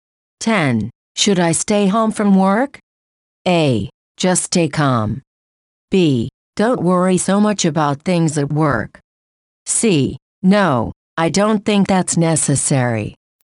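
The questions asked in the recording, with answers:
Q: Should I stay home from work?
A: C: No, I don't think that's necessary.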